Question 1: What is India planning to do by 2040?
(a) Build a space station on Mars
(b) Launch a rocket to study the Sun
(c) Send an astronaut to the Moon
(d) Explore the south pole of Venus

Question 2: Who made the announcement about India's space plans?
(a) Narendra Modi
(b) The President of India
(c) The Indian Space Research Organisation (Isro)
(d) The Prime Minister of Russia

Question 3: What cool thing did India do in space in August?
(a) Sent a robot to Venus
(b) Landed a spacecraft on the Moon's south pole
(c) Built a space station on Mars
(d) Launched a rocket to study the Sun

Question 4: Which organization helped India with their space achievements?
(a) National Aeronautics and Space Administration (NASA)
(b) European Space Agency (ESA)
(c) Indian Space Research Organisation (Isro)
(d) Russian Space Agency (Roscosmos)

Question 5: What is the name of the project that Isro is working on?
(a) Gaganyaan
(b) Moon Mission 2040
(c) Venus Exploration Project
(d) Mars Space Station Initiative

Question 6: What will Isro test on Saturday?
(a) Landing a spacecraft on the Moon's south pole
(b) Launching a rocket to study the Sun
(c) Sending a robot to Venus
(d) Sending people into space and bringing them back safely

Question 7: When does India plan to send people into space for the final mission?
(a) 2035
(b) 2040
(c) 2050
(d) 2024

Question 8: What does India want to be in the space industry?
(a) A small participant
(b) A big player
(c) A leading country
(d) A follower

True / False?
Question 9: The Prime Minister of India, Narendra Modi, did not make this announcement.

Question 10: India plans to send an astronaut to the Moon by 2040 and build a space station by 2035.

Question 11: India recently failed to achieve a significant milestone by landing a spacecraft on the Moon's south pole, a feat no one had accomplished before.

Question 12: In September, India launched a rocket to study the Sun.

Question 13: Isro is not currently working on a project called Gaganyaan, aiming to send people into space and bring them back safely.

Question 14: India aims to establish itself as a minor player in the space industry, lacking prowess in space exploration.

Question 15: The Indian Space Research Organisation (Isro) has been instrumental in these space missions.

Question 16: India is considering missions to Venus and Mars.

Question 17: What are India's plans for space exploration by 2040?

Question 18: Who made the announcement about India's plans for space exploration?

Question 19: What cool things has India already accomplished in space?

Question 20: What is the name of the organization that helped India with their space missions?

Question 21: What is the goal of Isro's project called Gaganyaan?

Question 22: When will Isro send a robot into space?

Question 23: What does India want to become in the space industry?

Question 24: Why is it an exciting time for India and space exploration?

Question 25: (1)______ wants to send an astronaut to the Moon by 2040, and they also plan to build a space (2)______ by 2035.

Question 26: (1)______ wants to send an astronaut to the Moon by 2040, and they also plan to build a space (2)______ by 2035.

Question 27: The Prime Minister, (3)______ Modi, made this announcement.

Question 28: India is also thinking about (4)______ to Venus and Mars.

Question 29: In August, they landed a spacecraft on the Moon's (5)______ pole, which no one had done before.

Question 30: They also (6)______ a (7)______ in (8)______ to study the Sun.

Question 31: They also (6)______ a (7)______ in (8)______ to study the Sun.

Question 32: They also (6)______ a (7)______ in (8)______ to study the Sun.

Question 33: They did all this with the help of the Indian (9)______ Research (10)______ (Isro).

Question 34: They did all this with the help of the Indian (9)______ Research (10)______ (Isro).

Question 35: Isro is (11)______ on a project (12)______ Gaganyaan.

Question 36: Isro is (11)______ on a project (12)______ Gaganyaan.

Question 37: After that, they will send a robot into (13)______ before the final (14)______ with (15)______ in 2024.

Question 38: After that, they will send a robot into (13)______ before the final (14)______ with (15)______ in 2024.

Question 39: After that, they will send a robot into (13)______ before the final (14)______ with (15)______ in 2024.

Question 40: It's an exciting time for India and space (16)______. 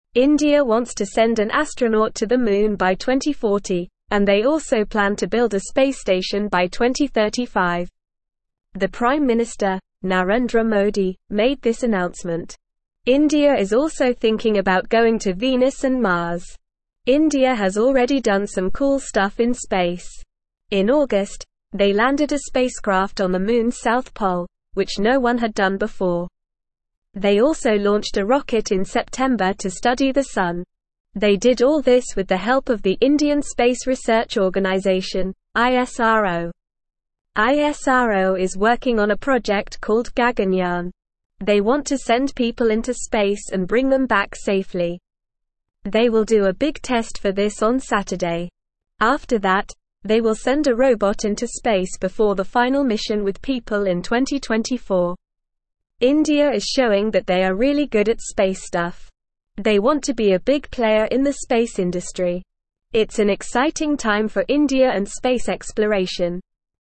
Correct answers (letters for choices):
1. c
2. a
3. b
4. c
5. a
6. d
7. d
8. b
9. False
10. True
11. False
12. True
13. False
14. False
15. True
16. True
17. send an astronaut to the Moon by 2040
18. Narendra Modi
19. landed a spacecraft on the Moon's south pole
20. Indian Space Research Organisation (Isro)
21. to send people into space and bring them back safely
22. before the final mission with people in 2024
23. a big player
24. they are showing their capabilities in space
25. India
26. station
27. Narendra
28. going
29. south
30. launched
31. rocket
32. September
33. Space
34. Organisation
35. working
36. called
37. space
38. mission
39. people
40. exploration

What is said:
India wants to send an astronaut to the Moon by 2040, and they also plan to build a space station by 2035. The Prime Minister, Narendra Modi, made this announcement. India is also thinking about going to Venus and Mars.
India has already done some cool stuff in space. In August, they landed a spacecraft on the Moon's south pole, which no one had done before. They also launched a rocket in September to study the Sun. They did all this with the help of the Indian Space Research Organisation (Isro).
Isro is working on a project called Gaganyaan. They want to send people into space and bring them back safely. They will do a big test for this on Saturday. After that, they will send a robot into space before the final mission with people in 2024.
India is showing that they are really good at space stuff. They want to be a big player in the space industry. It's an exciting time for India and space exploration.

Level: Level 3